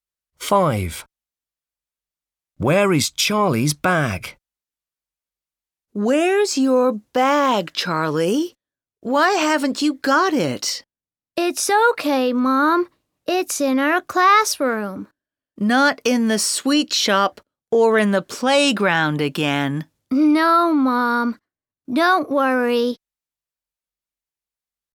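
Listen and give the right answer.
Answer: In the classroom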